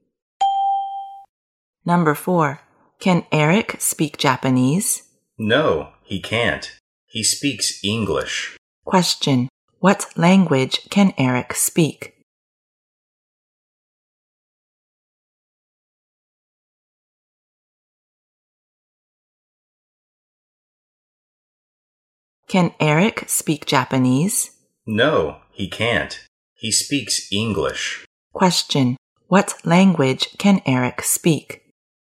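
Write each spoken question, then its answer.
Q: what language can Eric speak?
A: English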